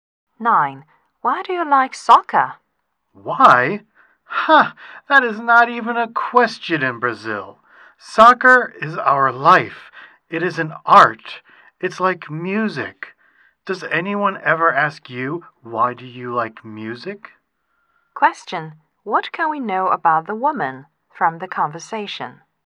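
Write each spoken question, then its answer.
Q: What can we know about the woman from the conversation?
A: She is from Brazil and loves soccer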